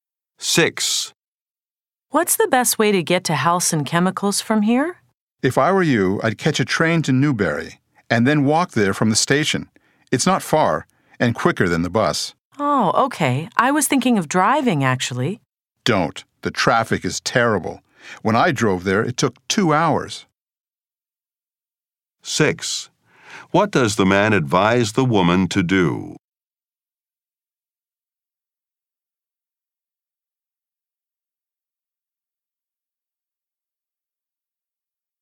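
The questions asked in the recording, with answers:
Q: What does the man advise the woman to do?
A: Take a train to Newbury and walk from the station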